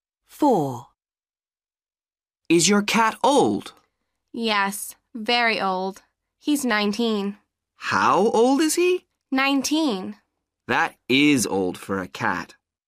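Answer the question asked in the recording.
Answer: 19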